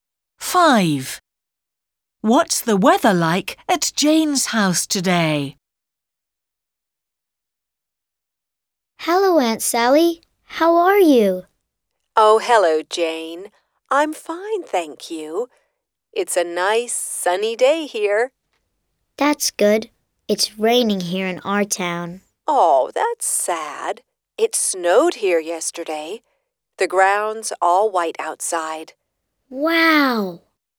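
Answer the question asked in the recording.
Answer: It's raining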